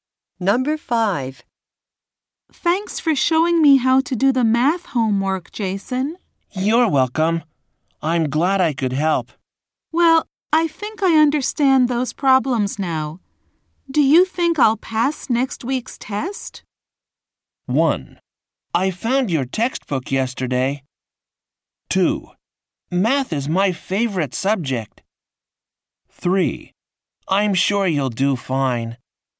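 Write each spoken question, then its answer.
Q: Do you think I'll pass next week's test?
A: 3: I'm sure you'll do fine.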